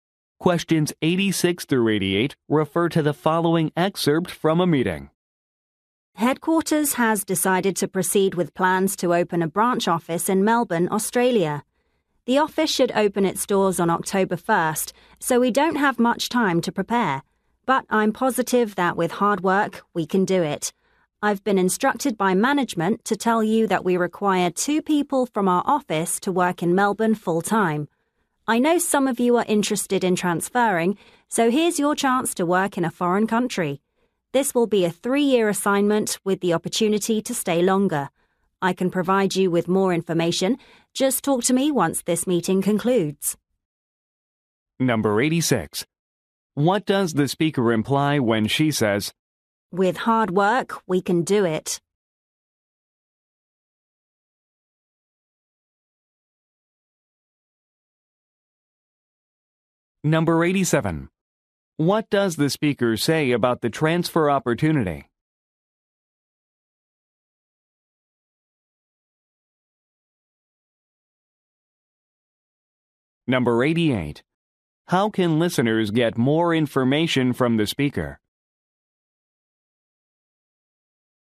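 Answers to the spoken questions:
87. It is a 3-year assignment with the chance to stay longer
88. Talk to her after the meeting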